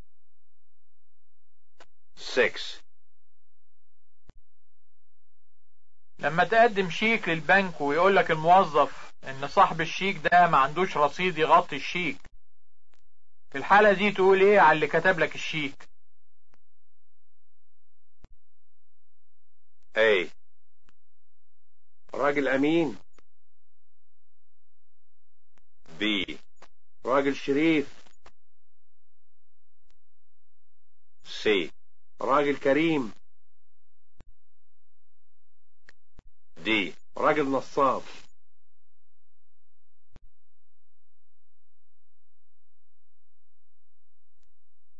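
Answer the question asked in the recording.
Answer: D: راجل نصاب.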